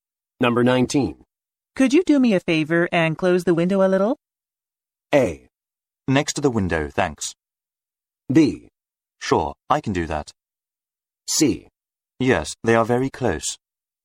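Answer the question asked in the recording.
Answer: B: Sure, I can do that.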